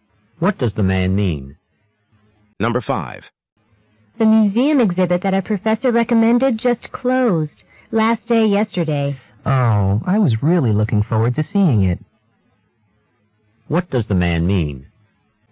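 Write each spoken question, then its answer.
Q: What does the man mean?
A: He is disappointed that he missed the exhibit.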